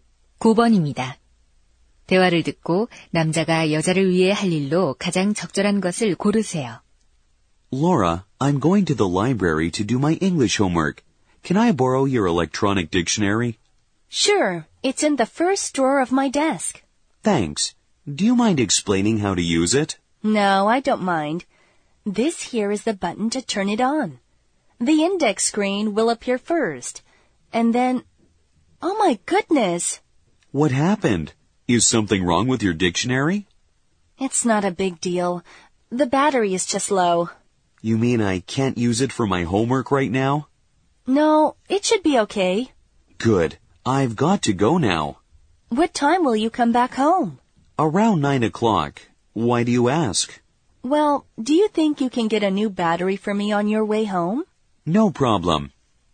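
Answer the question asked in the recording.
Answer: 새 배터리 사 오기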